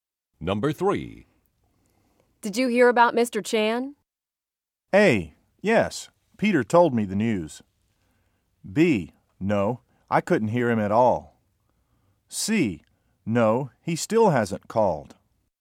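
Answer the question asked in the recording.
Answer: A: Yes, Peter told me the news.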